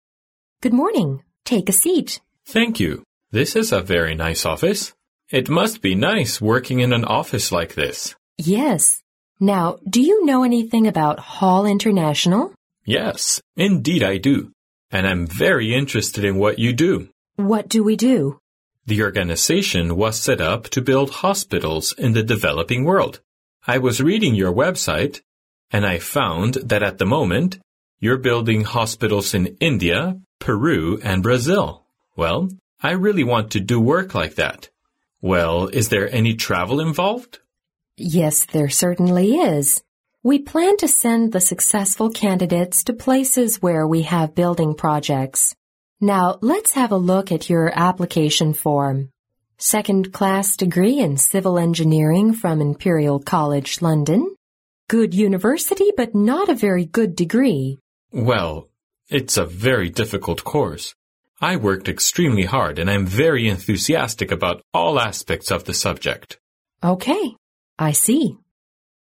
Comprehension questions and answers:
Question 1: The relationship between the speakers is probably interviewer and _____.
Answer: candidate

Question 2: Hall International builds _____ in developing countries.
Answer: hospitals

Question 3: The man got the information about Hall International from the _____.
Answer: website

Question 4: The man majored in _____ Engineering at college.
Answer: Civil

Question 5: The man worked extremely hard and he was enthusiastic about all aspects of the _____.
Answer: subject

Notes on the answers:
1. 根据录音中提到的"This is a very nice office"可知,他们是在一个办公室里,再根据后面的"we plan to send the successful candidates to...Let's have a look at your application form",可以断定他们是面试官和候选人,故答案为candidate。
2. 录音中提到"The organization was set up to build hospitals in the developing world",可知答案为hospitals。
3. 录音中男士提到"I was reading your website",可知他是从网站上了解的信息,故答案为website。
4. 女士在看男士简历时提到"second class degree in Civil Engineering",由此推断男士的专业是土木工程,故答案为Civil。
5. 录音中男士最后说,"I worked extremely hard and I'm very enthusiastic about all aspects of the subject.",可知答案为subject。

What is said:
W: Good morning. Take a seat.
M: Thank you. This's a very nice office. It must be nice working in an office like this.
W: Yes. Now, do you know anything about Hall International?
M: Yes, indeed I do. And I'm very interested in what you do.
W: What do we do?
M: The organization was set up to build hospitals in the developing world. I was reading your website and I found that at the moment, you're building hospitals in India, Peru and Brazil. Well, I really want to do work like that. Well, is there any travel involved?
W: Yes, there certainly is. We plan to send the successful candidates to places where we have building projects. Now let's have a look at your application form... second class degree in Civil Engineering from Imperial College, London. Good university, but not a very good degree.
M: Well, it's a very difficult course. I worked extremely hard and I'm very enthusiastic about all aspects of the subject.
W: OK, I see.